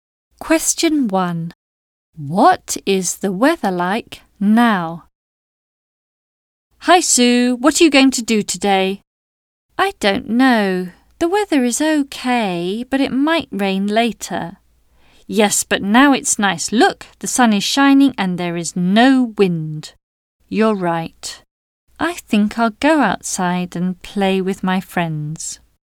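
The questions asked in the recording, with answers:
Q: What is the weather like now?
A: Sunny with no wind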